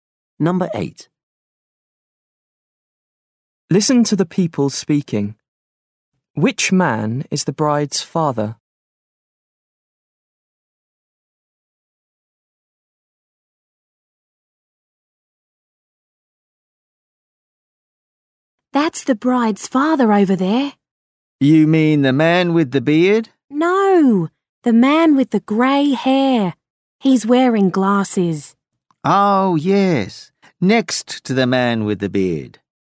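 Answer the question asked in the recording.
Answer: The man with grey hair and glasses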